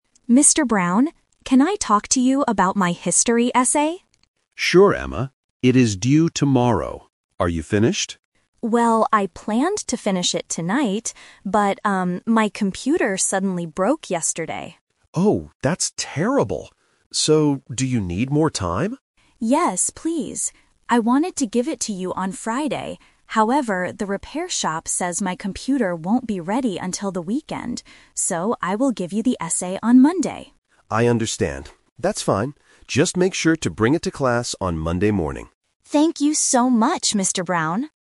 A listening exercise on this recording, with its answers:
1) Why does Emma need more time for her essay?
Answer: Her computer broke.

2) When will Emma give the essay to her teacher?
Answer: On Monday

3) What does the teacher tell Emma to do?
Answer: Bring the essay to class

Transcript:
Student: Mr. Brown, can I talk to you about my history essay?
Teacher: Sure, Emma. It is due tomorrow. Are you finished?
Student: Well, I planned to finish it tonight. But, um, my computer suddenly broke yesterday.
Teacher: Oh, that's terrible. So, do you need more time?
Student: Yes, please. I wanted to give it to you on Friday. However, the repair shop says my computer won't be ready until the weekend. So, I will give you the essay on Monday.
Teacher: I understand. That's fine.